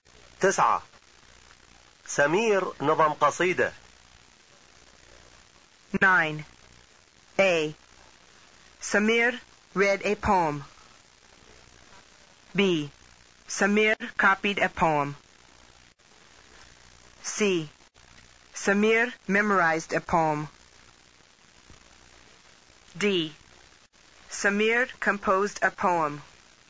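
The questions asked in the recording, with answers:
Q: تسعة. سمير نظم قصيدة.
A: D: Samir composed a poem.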